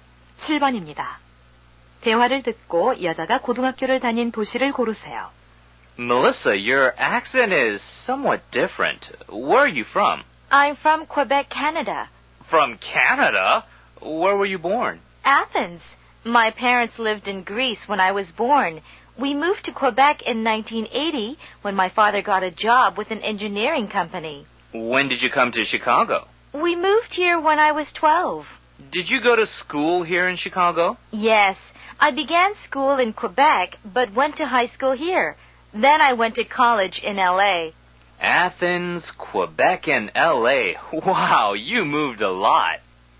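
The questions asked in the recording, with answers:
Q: 대화를 듣고 여자가 고등학교를 다닌 도시를 고르세요.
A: 시카고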